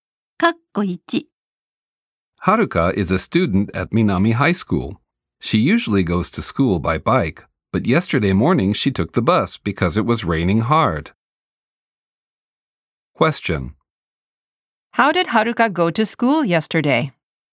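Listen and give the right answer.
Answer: By bus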